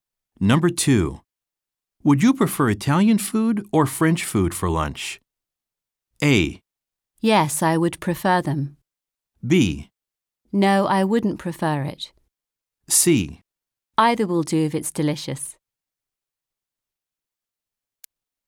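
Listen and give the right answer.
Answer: C: Either will do if it's delicious.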